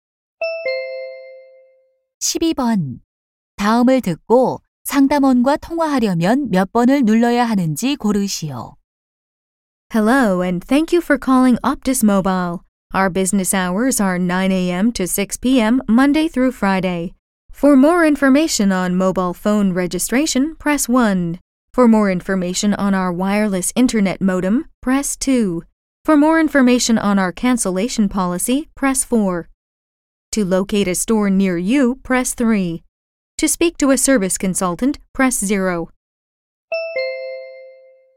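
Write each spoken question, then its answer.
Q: 다음을 듣고 상담원과 통화하려면 몇 번을 눌러야 하는지 고르시오.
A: 0번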